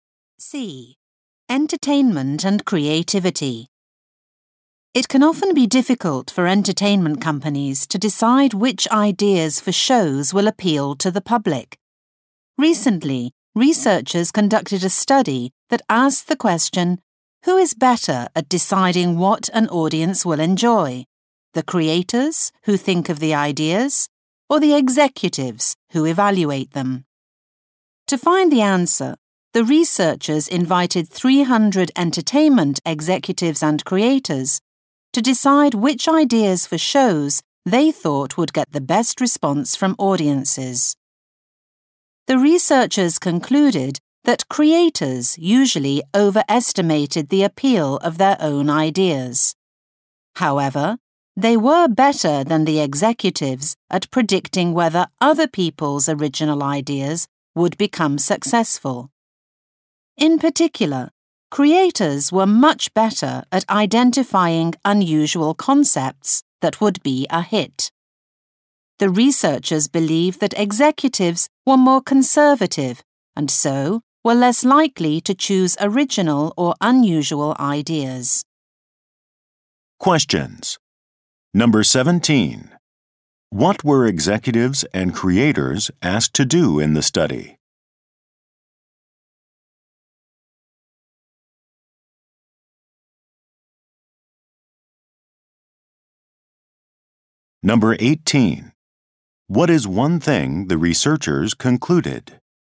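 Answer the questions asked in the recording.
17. Decide which show ideas would get the best audience response
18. Creators overestimated their own ideas but were better at predicting others' successes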